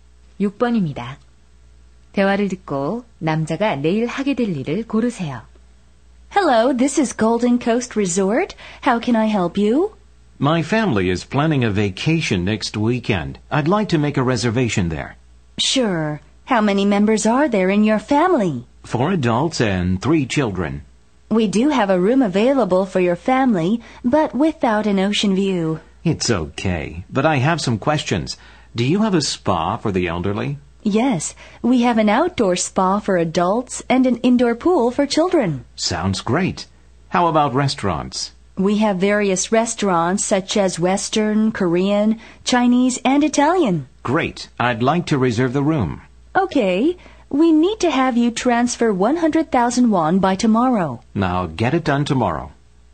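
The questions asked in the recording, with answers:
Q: 대화를 듣고 남자가 내일 하게 될 일을 고르세요.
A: 리조트 예약금 10만 원 송금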